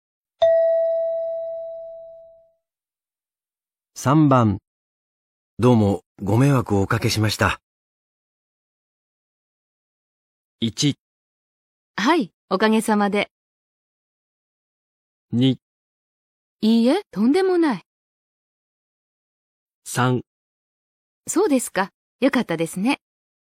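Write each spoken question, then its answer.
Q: どうもご迷惑をおかけしました。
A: 2: いいえ、とんでもない。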